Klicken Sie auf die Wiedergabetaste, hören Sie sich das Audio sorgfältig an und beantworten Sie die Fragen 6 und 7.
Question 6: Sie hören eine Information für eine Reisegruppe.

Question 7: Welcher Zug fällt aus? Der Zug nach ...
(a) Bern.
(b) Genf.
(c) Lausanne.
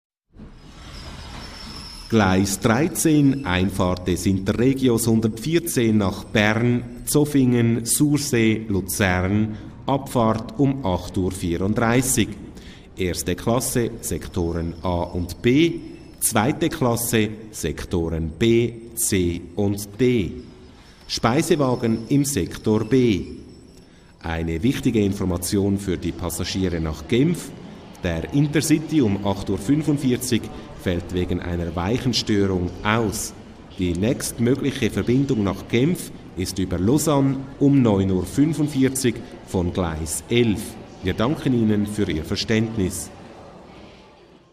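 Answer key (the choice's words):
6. Falsch
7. Genf.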